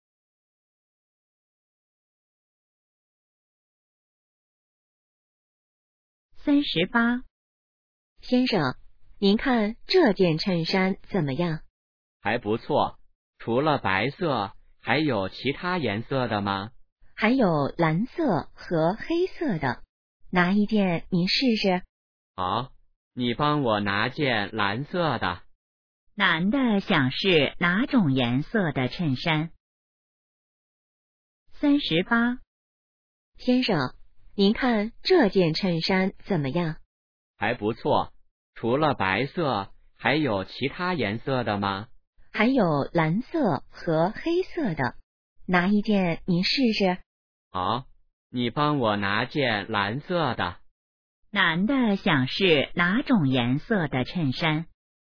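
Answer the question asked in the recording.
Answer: 蓝色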